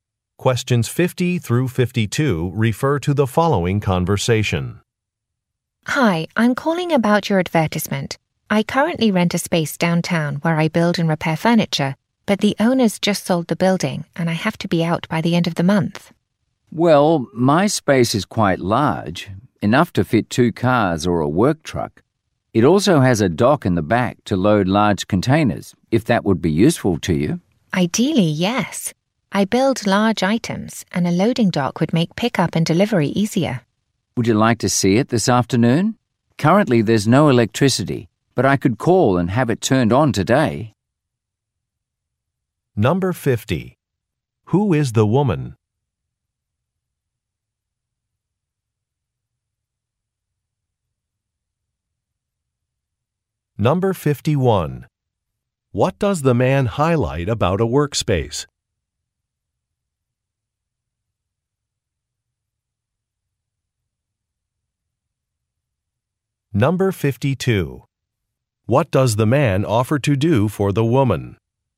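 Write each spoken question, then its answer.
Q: Who is the woman?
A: A furniture maker

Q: What does the man highlight about a workspace?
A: It is large and has a loading dock

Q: What does the man offer to do for the woman?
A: Have the electricity turned on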